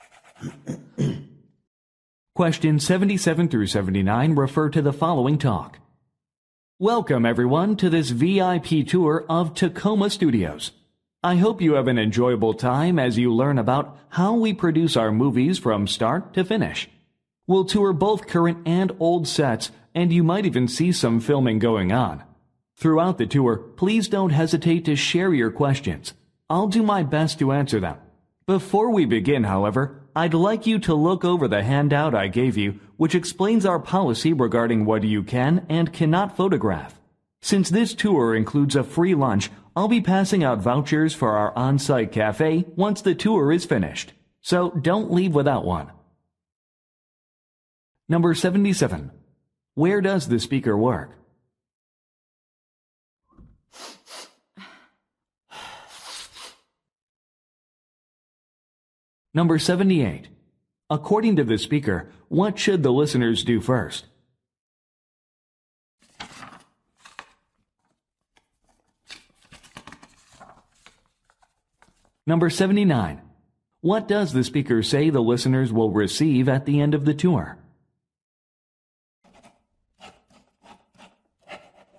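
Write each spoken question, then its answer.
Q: Where does the speaker work?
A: At a movie studio (Tacoma Studios)

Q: According to the speaker, what should the listeners do first?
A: Look over the handout on the photography policy

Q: What does the speaker say the listeners will receive at the end of the tour?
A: Vouchers for lunch at the on-site cafe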